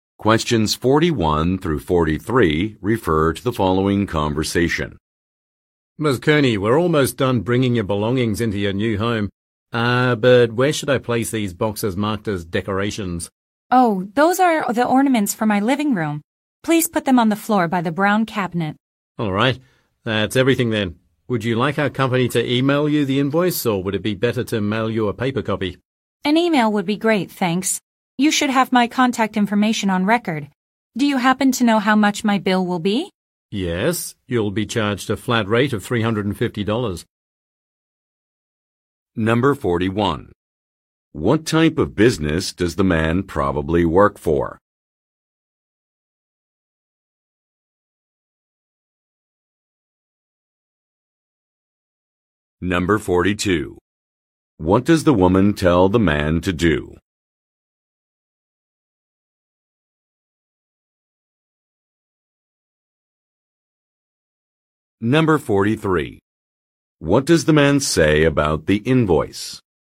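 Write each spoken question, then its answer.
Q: What type of business does the man probably work for?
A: A moving company

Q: What does the woman tell the man to do?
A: Put the decoration boxes on the floor by the brown cabinet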